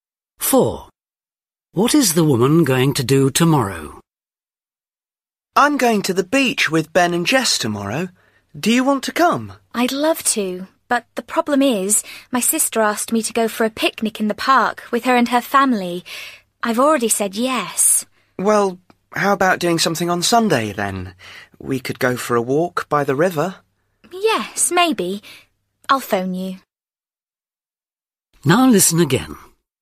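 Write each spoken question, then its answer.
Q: What is the woman going to do tomorrow?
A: have a picnic in the park with her sister's family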